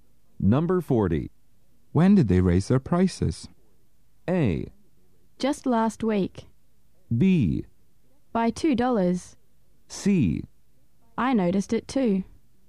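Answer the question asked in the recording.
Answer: A: Just last week.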